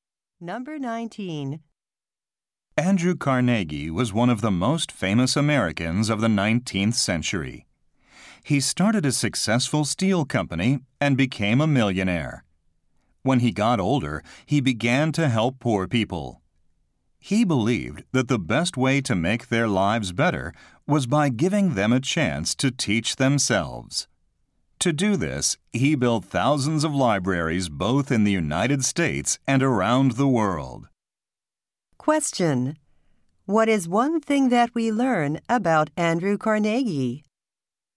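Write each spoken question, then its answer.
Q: What is one thing that we learn about Andrew Carnegie?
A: He built thousands of libraries.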